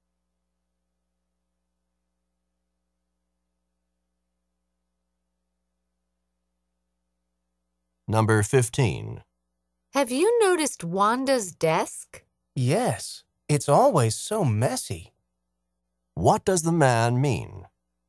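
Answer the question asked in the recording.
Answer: Wanda's desk is always messy.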